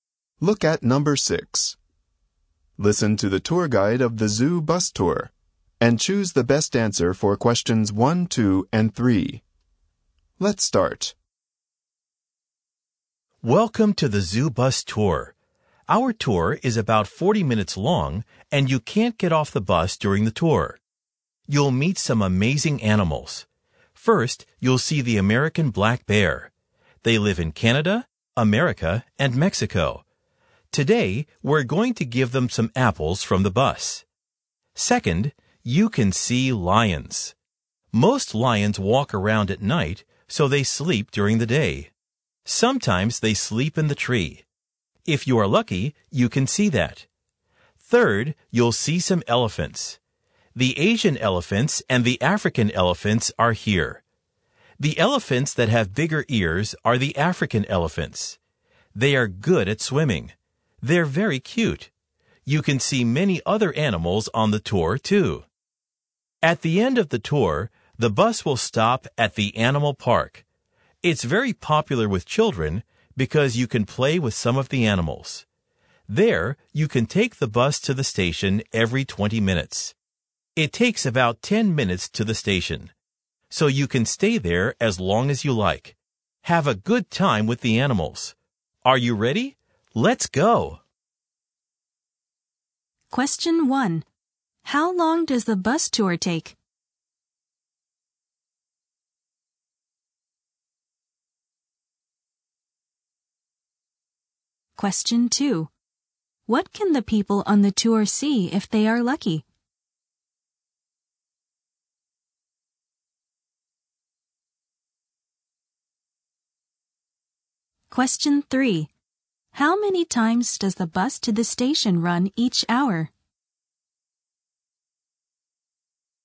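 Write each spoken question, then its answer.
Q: How long does the bus tour take?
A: About 40 minutes

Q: What can the people on the tour see if they are lucky?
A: Lions sleeping in the tree

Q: How many times does the bus to the station run each hour?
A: Three times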